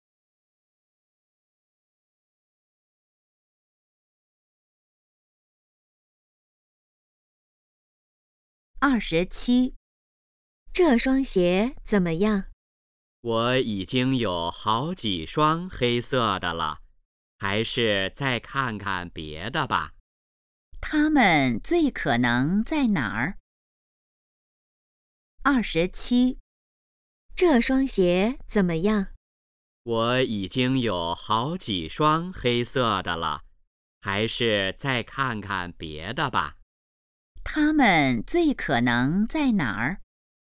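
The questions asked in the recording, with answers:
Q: 他们最可能在哪儿?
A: 鞋店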